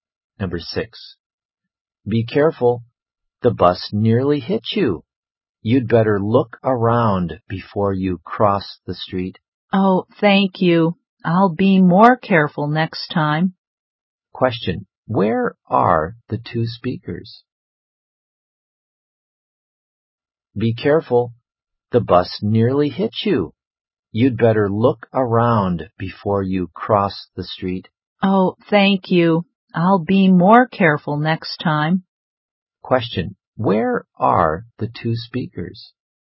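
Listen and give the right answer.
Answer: On the street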